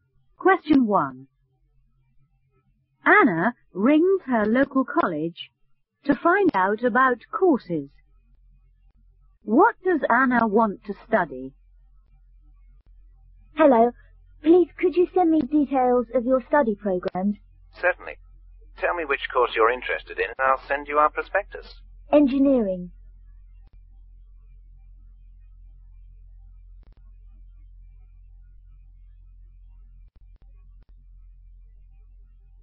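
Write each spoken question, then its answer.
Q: What does Anna want to study?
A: Engineering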